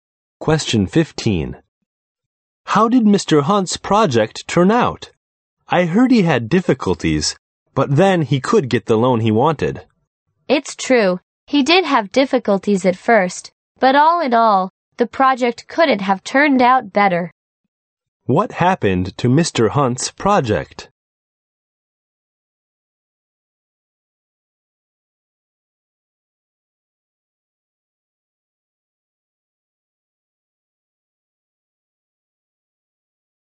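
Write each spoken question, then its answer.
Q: What happened to Mr. Hunt's project?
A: It turned out very well despite early difficulties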